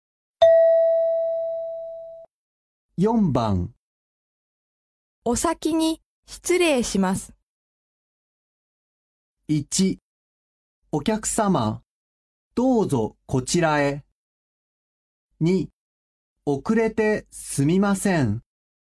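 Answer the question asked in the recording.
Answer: 3: お疲れ様。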